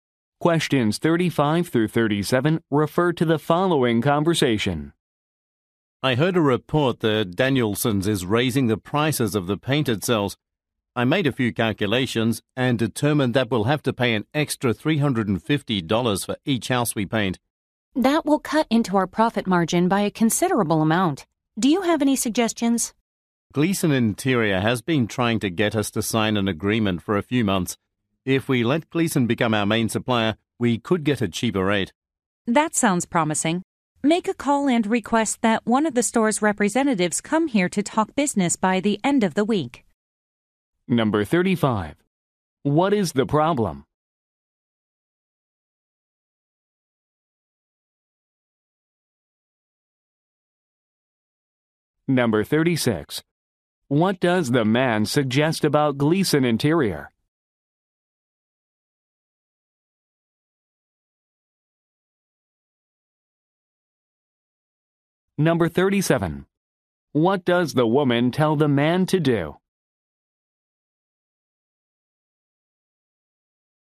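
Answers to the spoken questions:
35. A supplier is raising its paint prices
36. It could give them a cheaper rate as their main supplier
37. Call and ask a representative to come and talk business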